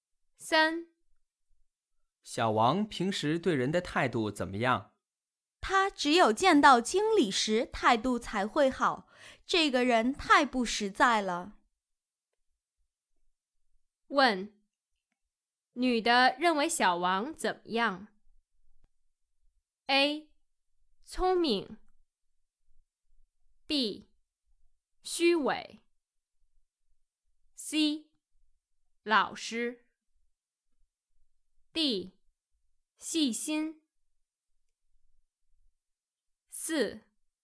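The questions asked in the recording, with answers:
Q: 问,女的认为小王怎么样? A. 聪明 B. 虚伪 C. 老实D. 细心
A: B: 虚伪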